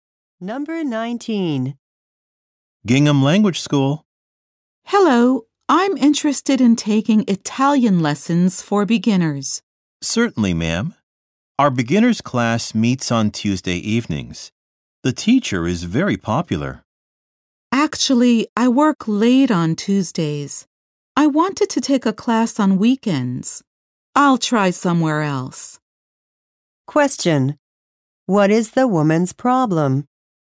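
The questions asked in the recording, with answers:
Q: What is the woman's problem?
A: She works late on Tuesdays, when the beginners class meets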